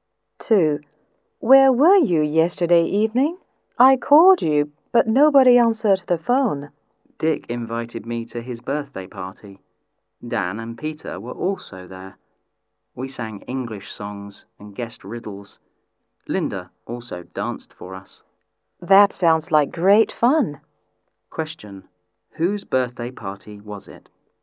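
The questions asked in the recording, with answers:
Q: Whose birthday party was it?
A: Dick's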